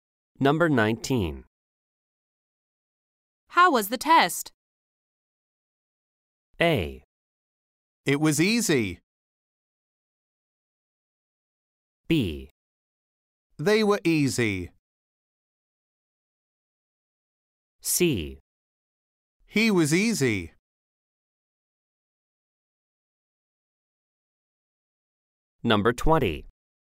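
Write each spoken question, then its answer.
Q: How was the test?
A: A: It was easy.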